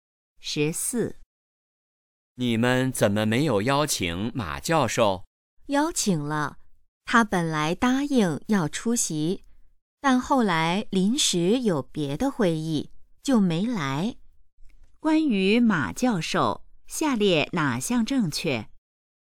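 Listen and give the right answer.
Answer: 他临时有别的会议,没来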